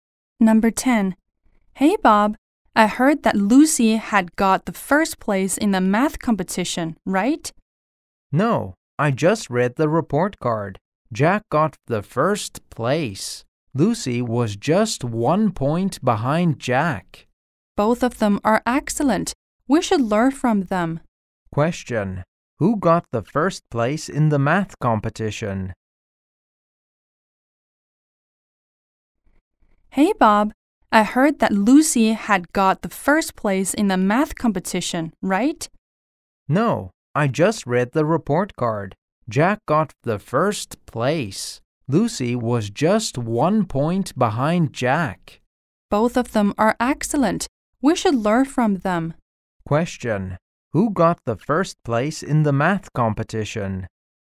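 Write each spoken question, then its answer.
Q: Question. Who got the first place in the math competition?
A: Jack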